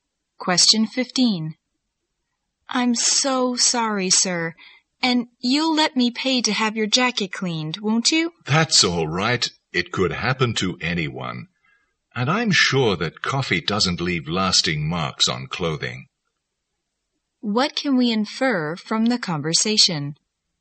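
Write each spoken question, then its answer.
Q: What can we infer from the conversation?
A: The woman spilled coffee on the man's jacket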